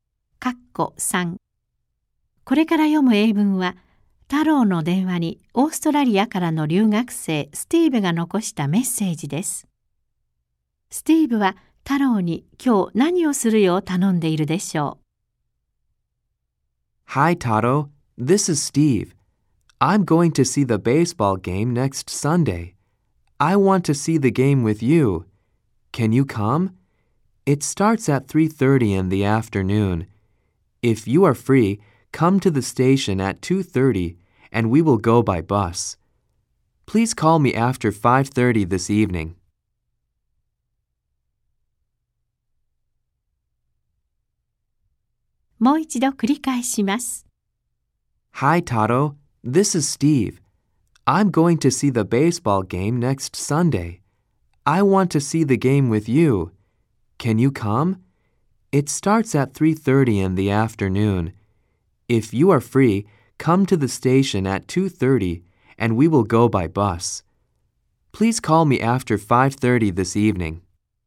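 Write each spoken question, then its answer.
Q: スティーブは、太郎に今日何をするよう頼んでいるでしょう。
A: 午後5時30分以降に電話すること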